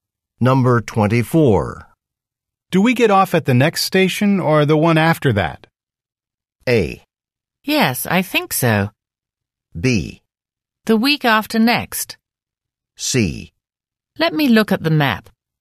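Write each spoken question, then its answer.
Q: Do we get off at the next station or the one after that?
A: C: Let me look at the map.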